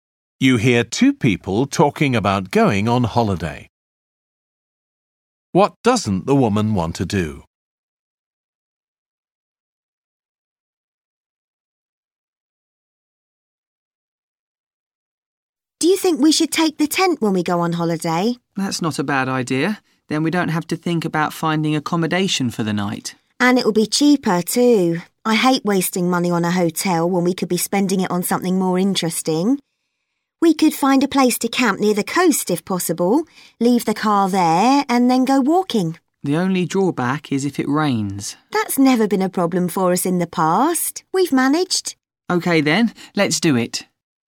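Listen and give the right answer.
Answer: Spend money on a hotel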